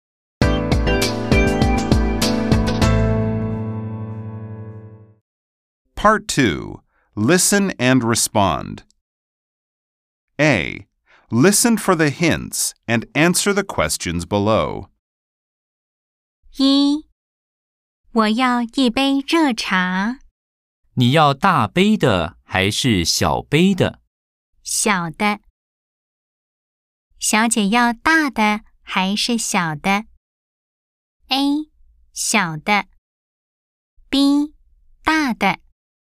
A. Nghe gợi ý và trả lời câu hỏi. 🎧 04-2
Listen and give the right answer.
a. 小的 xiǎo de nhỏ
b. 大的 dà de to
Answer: a. 小的 xiǎo de nhỏ